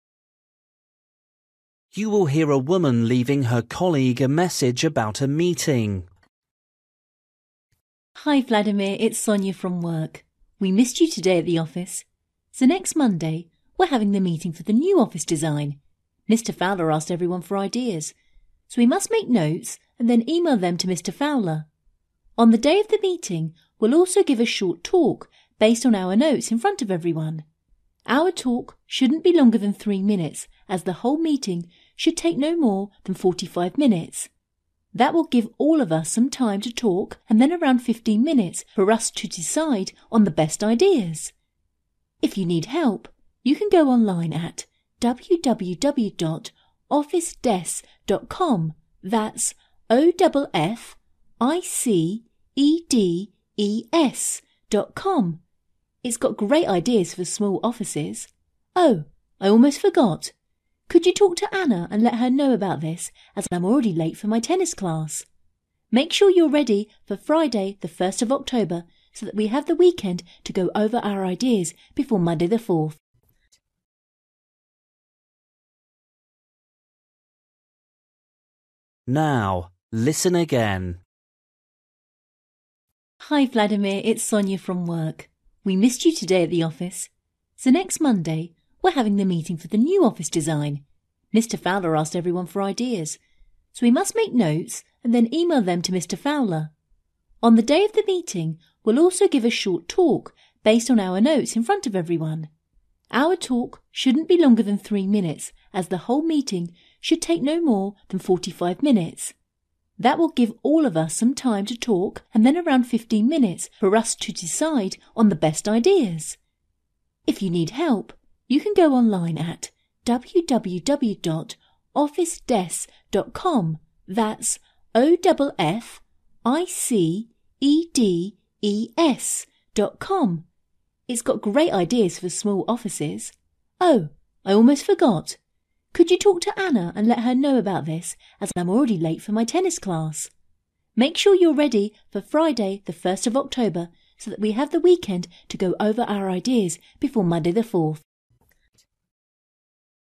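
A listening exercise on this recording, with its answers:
For each question, write the correct answer in the gap. Write one word or a number or a date or a time.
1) What to prepare: (1)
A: notes

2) Meeting will be: (2) minutes long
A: 45

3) Website: www. (3) .com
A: officedes

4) Call: (4)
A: Anna

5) Date of the meeting: (5) October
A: 4th

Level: Luyện nghe trình độ A2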